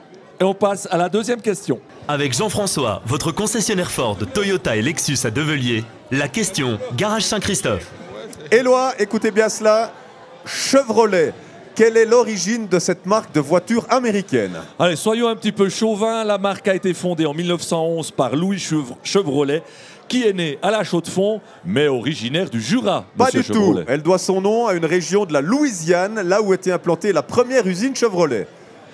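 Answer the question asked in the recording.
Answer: A: fondée en 1911 par Louis Chevrolet, né à La Chaux-de-Fonds, originaire du Jura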